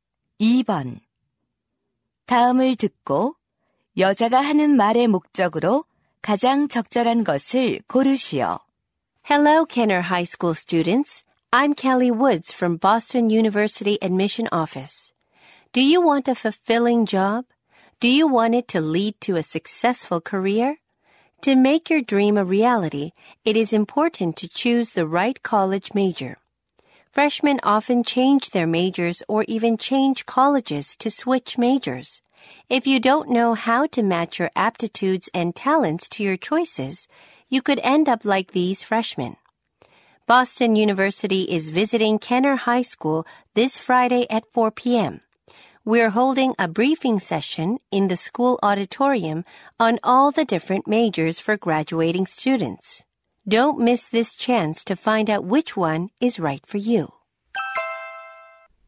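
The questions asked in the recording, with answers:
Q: 다음을 듣고 여자가 하는 말의 목적으로 가장 적절한 것을 고르시오.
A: 전공 설명회 참석 권유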